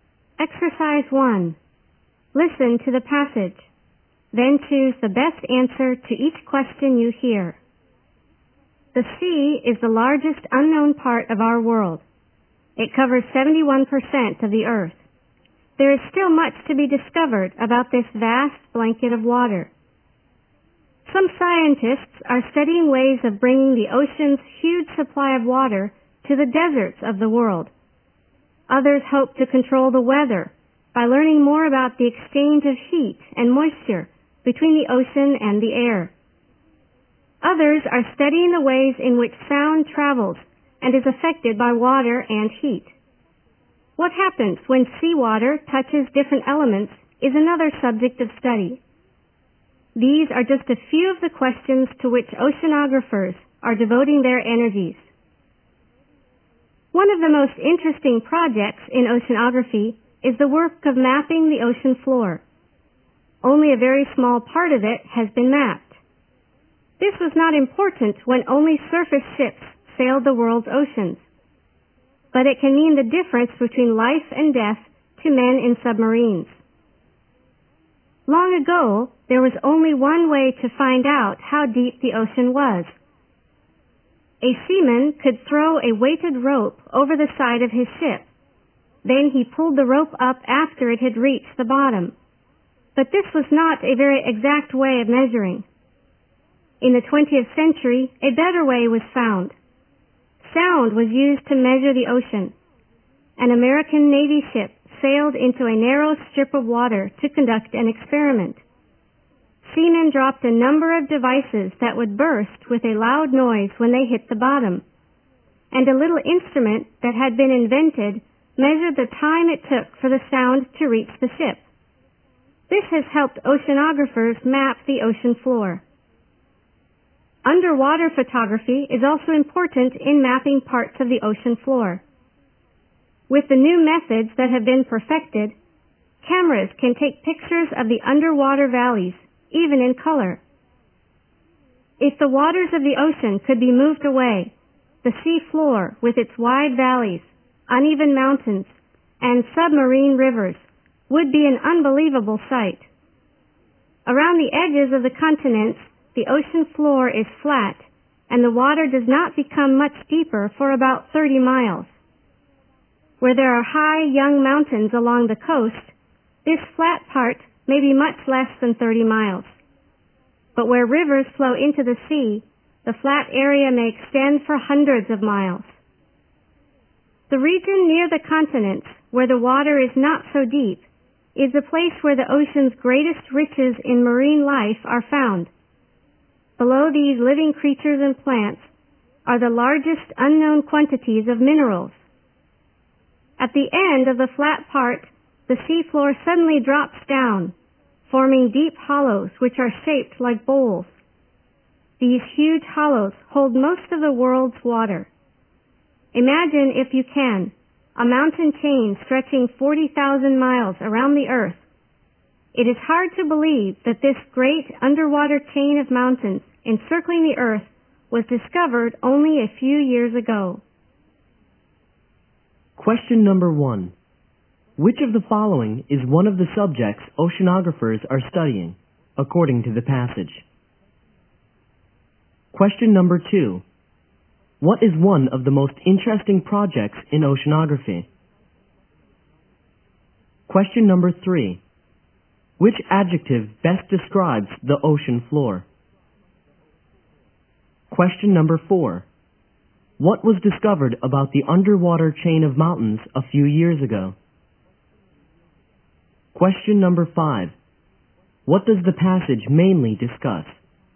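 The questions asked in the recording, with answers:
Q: What is one of the most interesting projects in oceanography?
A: Mapping the ocean floor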